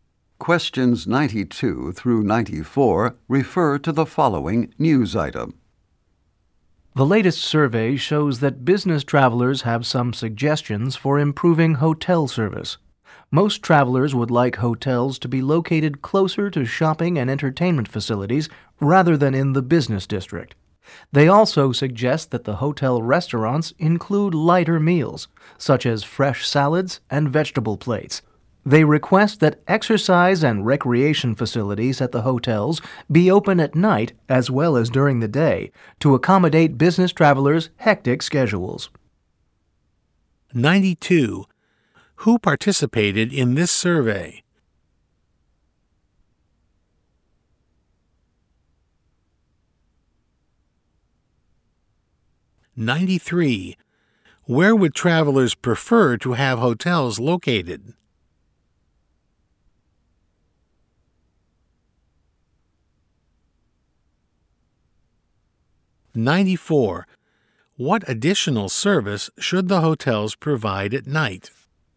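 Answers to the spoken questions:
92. Business travelers
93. Closer to shopping and entertainment facilities
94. Open exercise and recreation facilities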